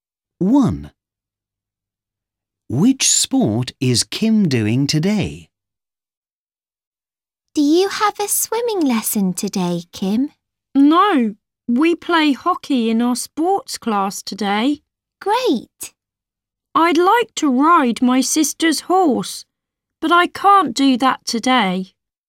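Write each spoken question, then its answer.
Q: Which sport is Kim doing today?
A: hockey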